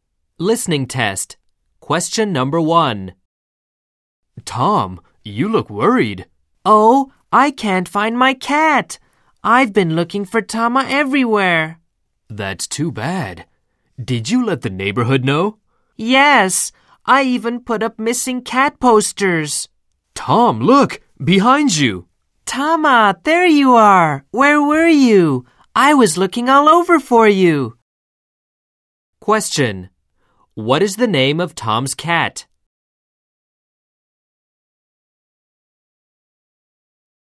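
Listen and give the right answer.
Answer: Tama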